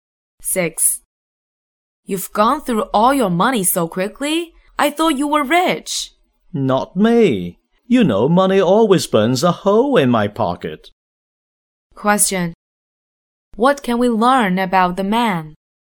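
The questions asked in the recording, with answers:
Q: What can we learn about the man?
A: He spends money quickly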